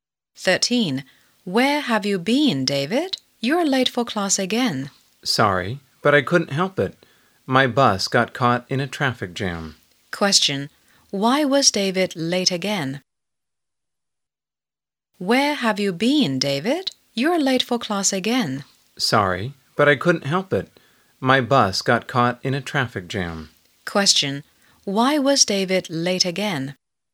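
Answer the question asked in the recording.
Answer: His bus got caught in a traffic jam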